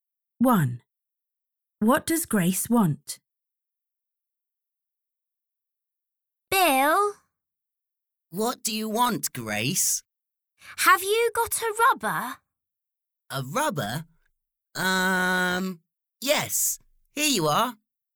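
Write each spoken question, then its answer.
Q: What does Grace want?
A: a rubber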